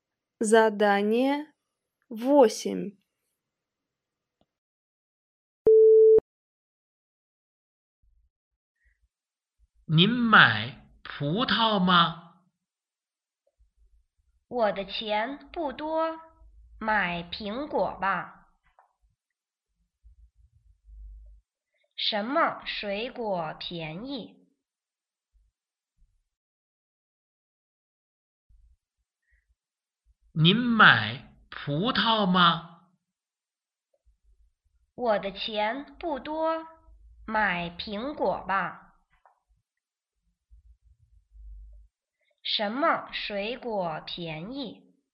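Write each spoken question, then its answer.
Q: 什么水果便宜?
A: 苹果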